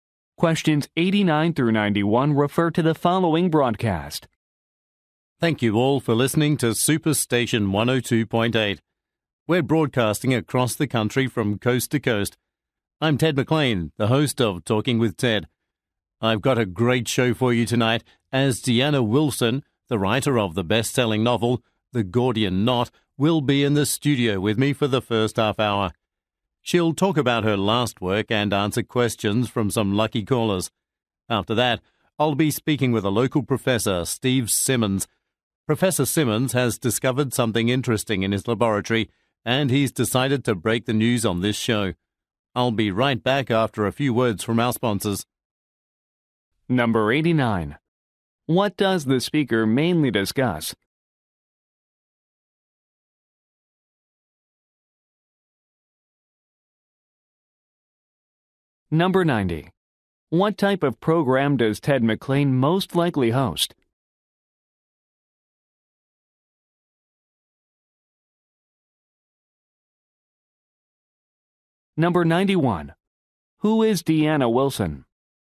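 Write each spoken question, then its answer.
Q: What does the speaker mainly discuss?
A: Tonight's show lineup

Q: What type of program does Ted McLean most likely host?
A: A talk show

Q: Who is Deanna Wilson?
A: A best-selling novelist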